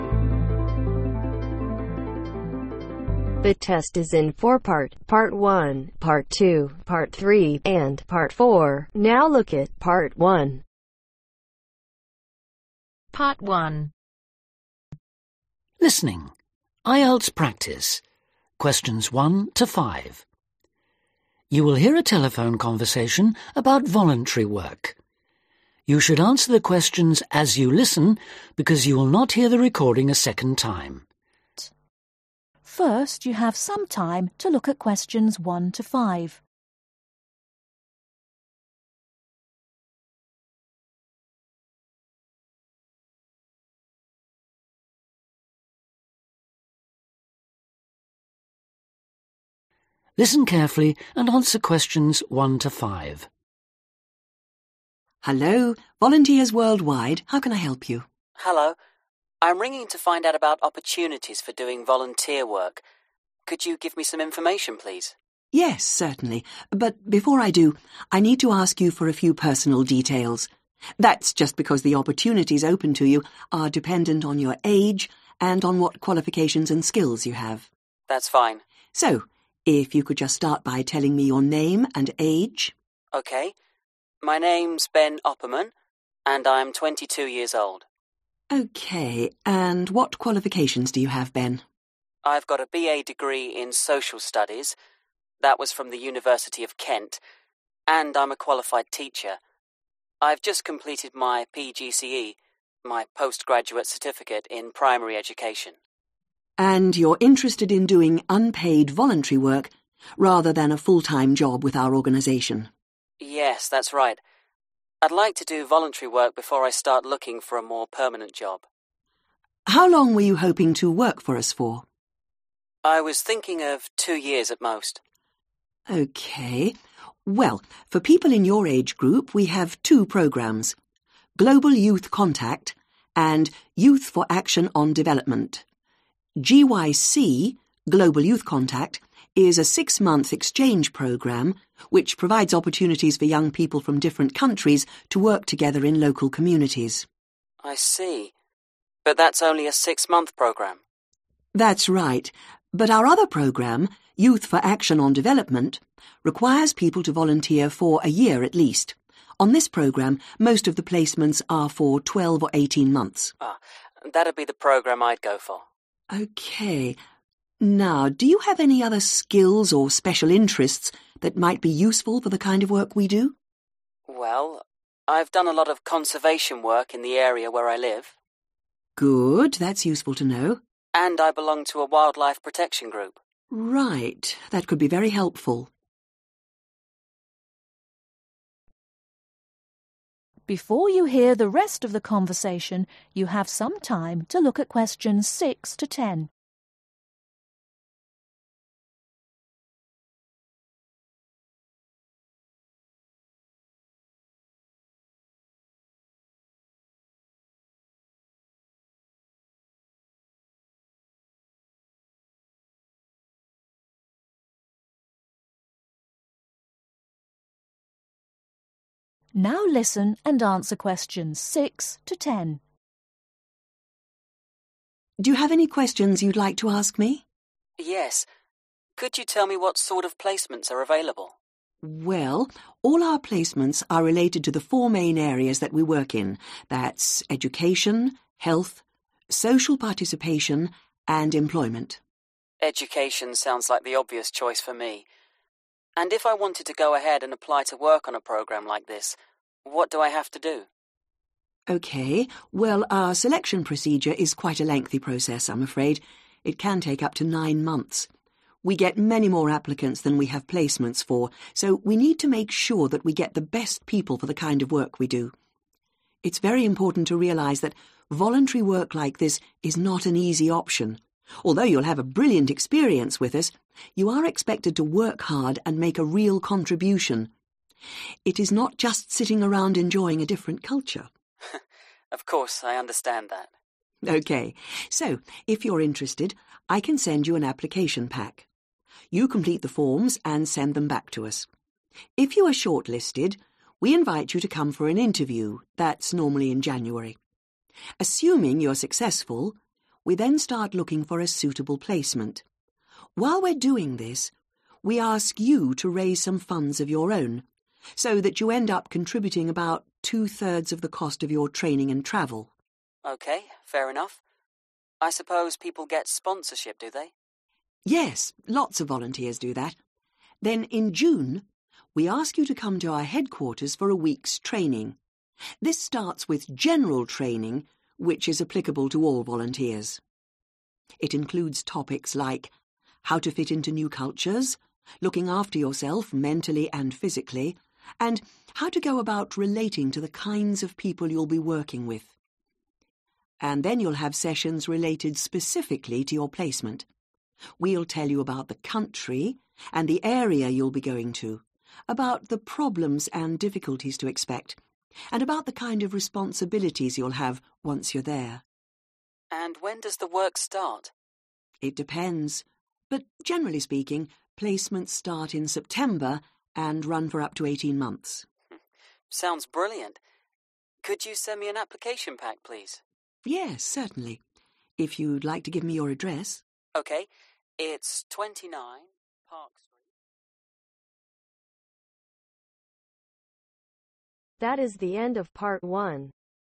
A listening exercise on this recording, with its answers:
Write ONE WORD ONLY for each answer.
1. Age: (1)............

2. Postgraduate Certificate in (2)............ Education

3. Interested in a placement lasting (3)............ years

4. Experience of (4)............ work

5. Member of a (5)............ protection group.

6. how long can the selection procedure for applicants take ?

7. When are short-listed applicants usually interviewed ?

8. Approximately what proportion of the cost of their training and travel are applicants expected to contribute ?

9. How long does each volunteer's training last ?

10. when do placements generally begin ?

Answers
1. 22
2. Primary
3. Two
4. Conservation
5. Wildlife
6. Nine months
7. January
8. Two thirds
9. One week
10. September